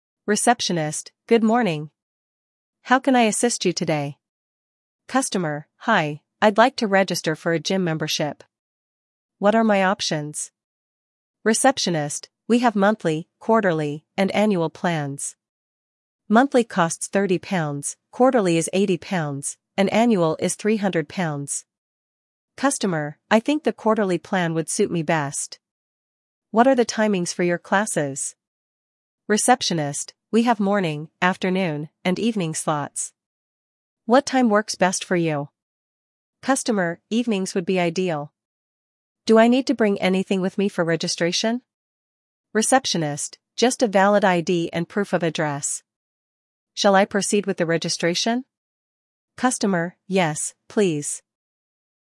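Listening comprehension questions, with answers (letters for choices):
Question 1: How many membership options are available?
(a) One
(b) Two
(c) Three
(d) Four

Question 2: What is the cost of the annual plan?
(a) £30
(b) £80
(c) £300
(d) £400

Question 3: Which time slot does the customer choose?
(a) Morning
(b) Afternoon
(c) Evening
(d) Weekend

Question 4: What documents are required for registration?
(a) ID only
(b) ID and proof of address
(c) Passport only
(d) No documents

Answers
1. c
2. c
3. c
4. b

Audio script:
How can I assist you today?" Customer: "Hi, I'd like to register for a gym membership. What are my options?" Receptionist: "We have monthly, quarterly, and annual plans. Monthly costs £30, quarterly is £80, and annual is £300." Customer: "I think the quarterly plan would suit me best. What are the timings for your classes?" Receptionist: "We have morning, afternoon, and evening slots. 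What time works best for you?" Customer: "Evenings would be ideal. Do I need to bring anything with me for registration?" Receptionist: "Just a valid ID and proof of address. Shall I proceed with the registration?" Customer: "Yes, please." Questions: How many membership options are available?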